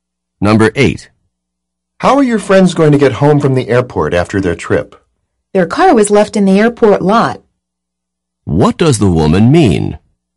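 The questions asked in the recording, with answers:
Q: What does the woman mean?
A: They will drive home in their car left at the airport lot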